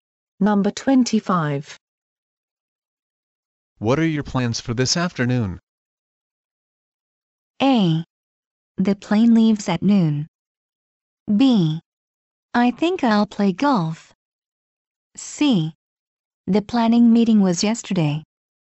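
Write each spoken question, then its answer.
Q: What are your plans for this afternoon?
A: B: I think I'll play golf.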